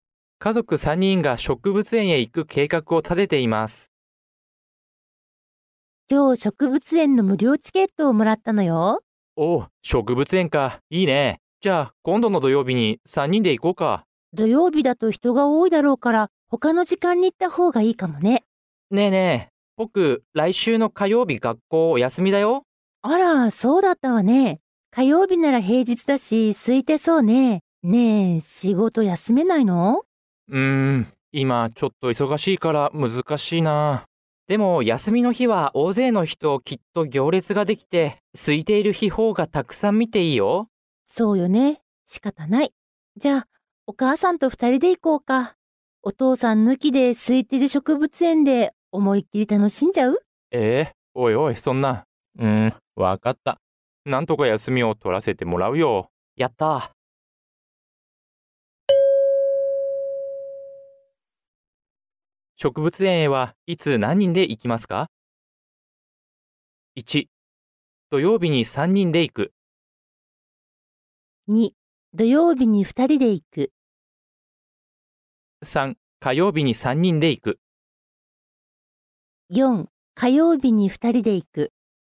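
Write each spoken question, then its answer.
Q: 植物園へはいつ何人で行きますか?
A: 3: 火曜日に3人で行く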